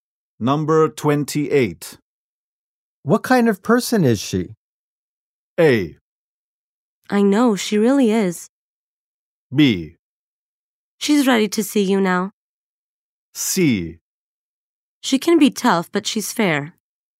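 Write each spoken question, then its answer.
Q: What kind of person is she?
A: C: She can be tough, but she's fair.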